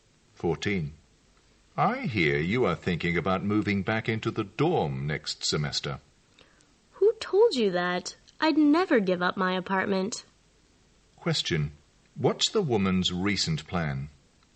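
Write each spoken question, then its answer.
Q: What's the woman's recent plan?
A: To keep her apartment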